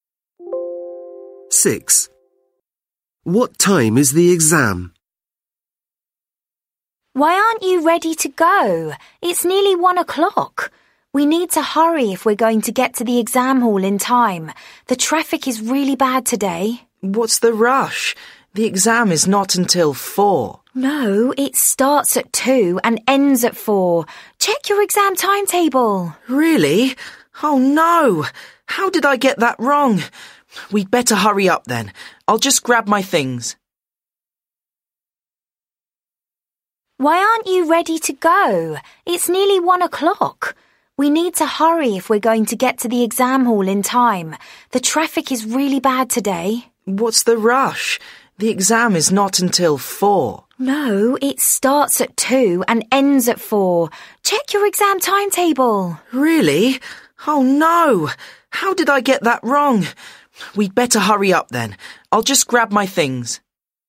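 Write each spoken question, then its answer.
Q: What time is the exam?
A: At 2 o'clock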